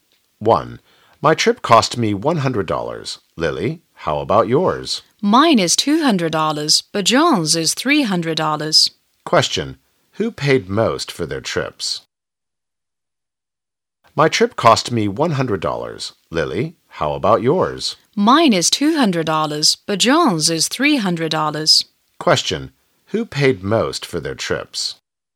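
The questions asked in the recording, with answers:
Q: Question, who paid most for their trips?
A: John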